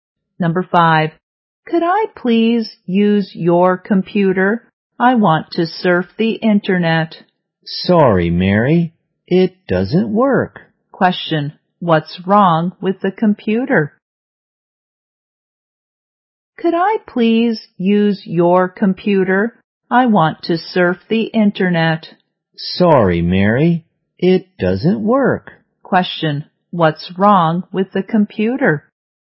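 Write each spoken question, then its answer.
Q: What's wrong with the computer?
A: It doesn't work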